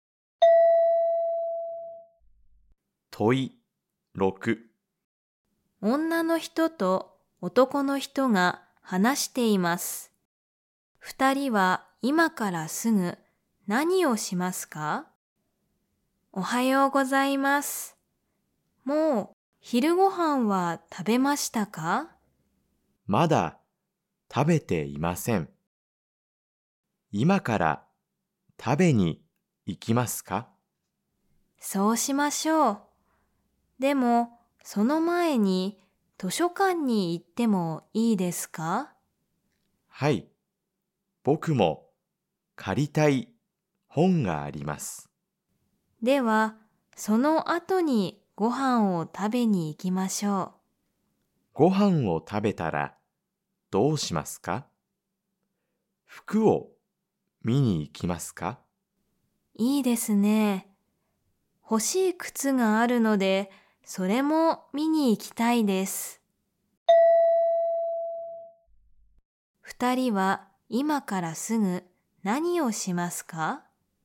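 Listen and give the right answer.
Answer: 図書館に行く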